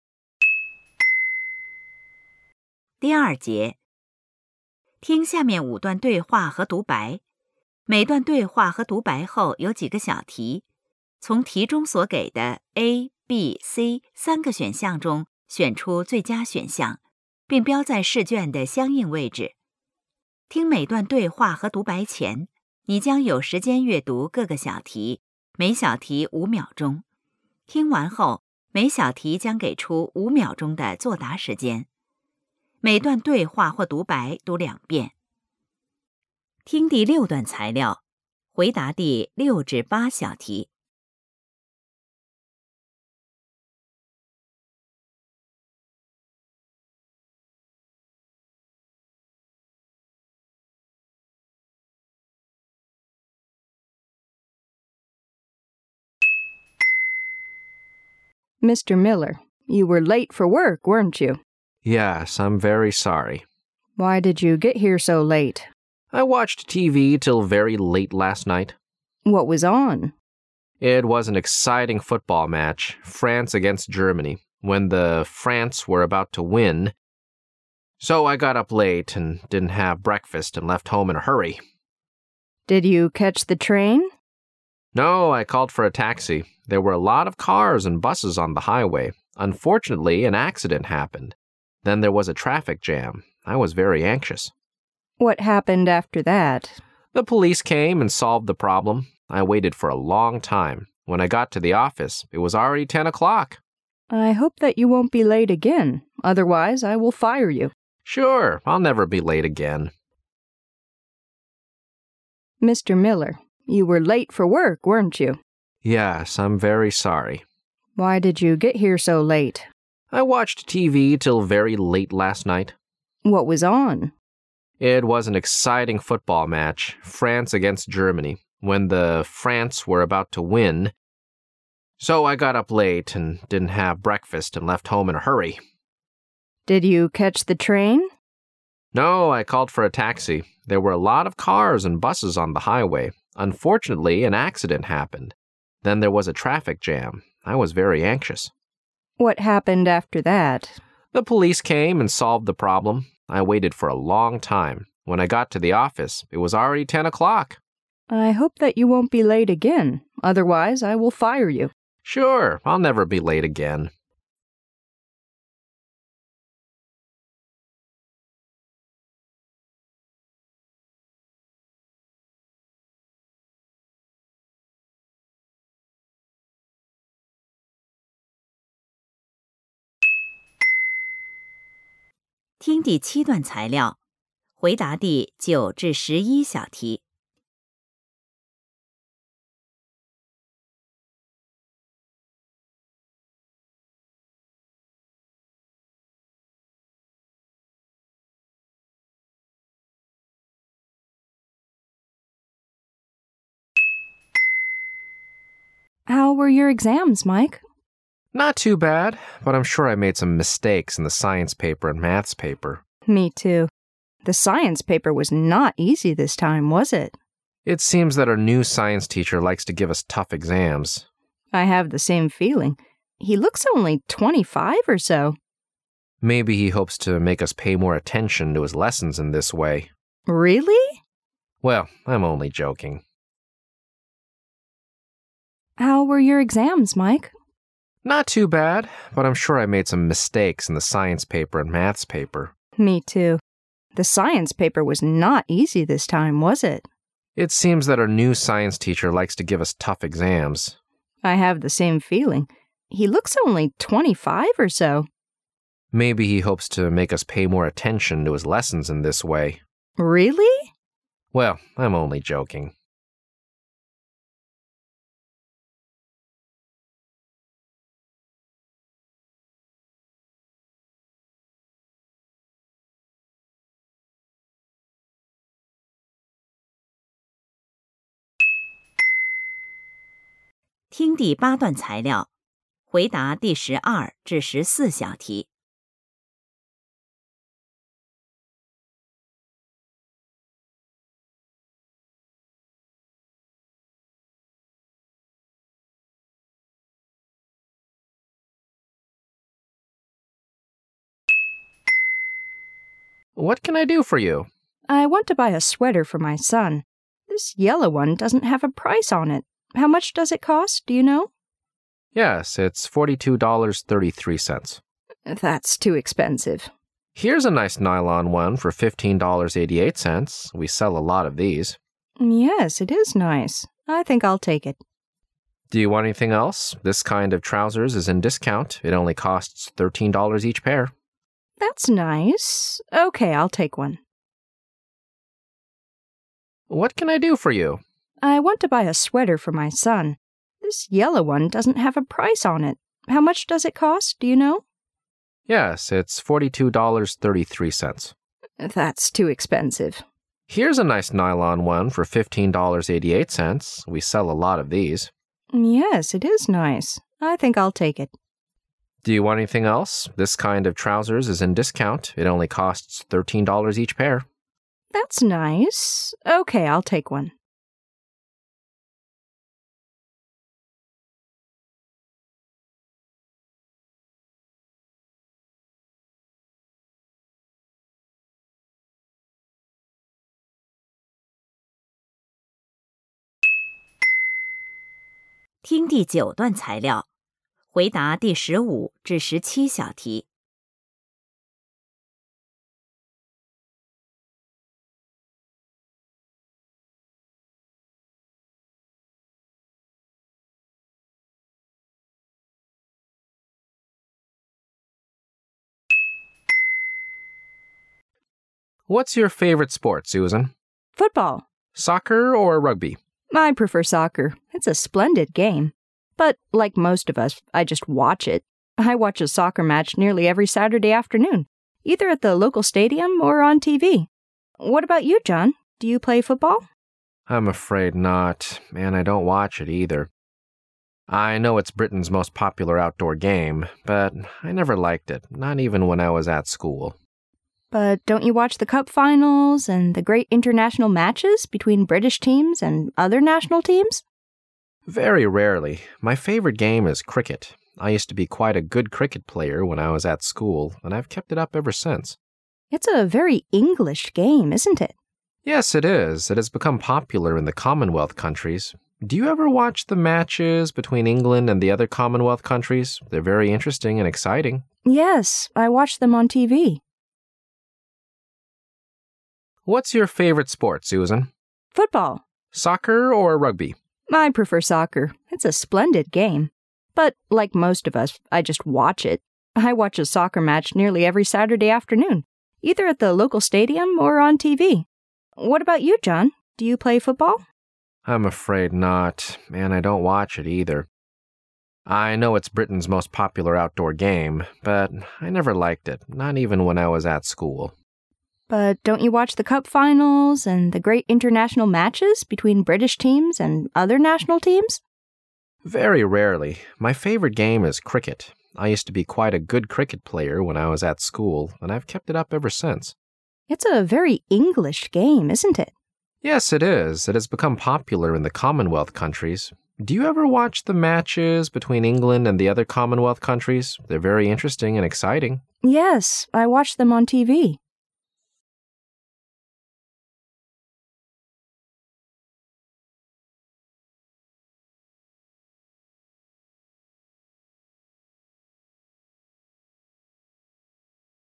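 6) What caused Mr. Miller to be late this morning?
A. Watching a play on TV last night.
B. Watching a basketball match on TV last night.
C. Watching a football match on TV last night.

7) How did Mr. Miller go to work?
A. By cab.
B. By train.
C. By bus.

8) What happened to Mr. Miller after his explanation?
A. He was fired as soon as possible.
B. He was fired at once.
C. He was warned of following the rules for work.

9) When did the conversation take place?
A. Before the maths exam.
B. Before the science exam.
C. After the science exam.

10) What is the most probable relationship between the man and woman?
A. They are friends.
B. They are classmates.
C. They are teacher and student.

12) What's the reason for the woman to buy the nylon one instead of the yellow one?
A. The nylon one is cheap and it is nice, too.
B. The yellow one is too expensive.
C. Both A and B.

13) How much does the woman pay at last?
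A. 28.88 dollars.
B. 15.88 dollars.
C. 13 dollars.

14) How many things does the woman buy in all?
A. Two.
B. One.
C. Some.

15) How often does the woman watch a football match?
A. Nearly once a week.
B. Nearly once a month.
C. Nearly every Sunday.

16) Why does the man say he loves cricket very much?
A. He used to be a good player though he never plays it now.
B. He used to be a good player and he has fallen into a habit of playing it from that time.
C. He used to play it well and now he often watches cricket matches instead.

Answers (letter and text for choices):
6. C. Watching a football match on TV last night.
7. A. By cab.
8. C. He was warned of following the rules for work.
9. C. After the science exam.
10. B. They are classmates.
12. C. Both A and B.
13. A. 28.88 dollars.
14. A. Two.
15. A. Nearly once a week.
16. B. He used to be a good player and he has fallen into a habit of playing it from that time.

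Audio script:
W: Mr. Miller, you were late for work, weren't you?
M: Yes , I'm very sorry.
W: Why did you get here so late?
M:I watched TV till very late last night.
W: What was on?
M: It was an exc iting football match. France against Germany. When the France were about to win... So, I got up late and didn't have breakfast and left home in a hurry.
W: Did you catch the train?
M: No, I called for a taxi. There were a lot of cars and buses on the highway. Unfortunately an accident happened. Then, there was a traffic jam. I was very anxious...
W: What happened after that?
M: The police came and solved the problem. I waited for a long time. When I got to the office, it was already 10 o'clock.
W:I hope that you won't be late again. Otherwise I will fire you.
M: Sure, I'll never be late again.
听第7段材料,回答第9~11小题。
W:How were your exams,Mike?
M: Not too bad. But I'm sure I made some mistakes in the science paper and maths paper.
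W: Me,too. The science paper was not easy this time, was it?
M: It seems that our new science teacher likes to give us tough exams.
W: I have the same feeling. He looks only 25 or so.
M: Maybe he hopes to make us pay more attention to his lessons in this way.
W: Really?
M: Well. I'm only joking.
听第8题材料,回答第12~14小题。
M:What can I do for you?
W:I want to buy a sweater for my son. This yellow one doesn't have a price on it. How much does it cost? Do you know?
M:Yes, it's £42.33.
W:That's too expensive.
M:Here's a nice nylon one for £15.88.We sell a lot of these.
W:Yes, it is nice. I think I'll take it.
M:Do you want anything else? This kind of trousers is in discount. It only costs £13 each pair.
W:That's nice. OK, I'll take one.
听第9段材料,回答第15~17小题。
M: What's your favourite sport, Susan?
W: Football.
M: Soccer or rugby?
W: I prefer soccer. It's a splendid game. But, like most of us, I just watch it. 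I watch a soccer match nearly every Saturday afternoon either at the local stadium or on TV. What about you, John?Do you play football?
M:I'm afraid not. And I don't watch it either. I know it's Britain's most popular outdoor game, but I never liked it, not even when I was at school.
W:But don't you watch the Cup finals and the great international matches between British teams and other national teams?
M:Very rarely. My favourite game is cricket. I used to be quite a good cricket player when I was at school and I've kept it up ever since.
W:It's a very English game, isn't it?
M:Yes, it is. It has become popular in the Commonwealth countries. Do you ever watch the matches between England and the other Commonwealth countries?They're very interesting and exciting.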